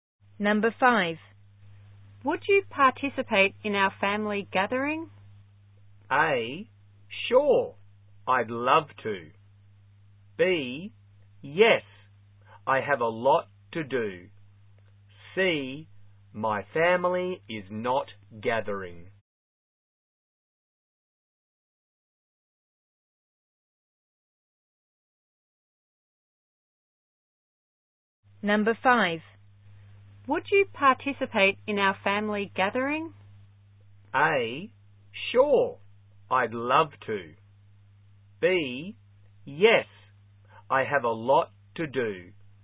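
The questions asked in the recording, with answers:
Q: Would you participate in our family gathering?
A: A: sure, I'd love to.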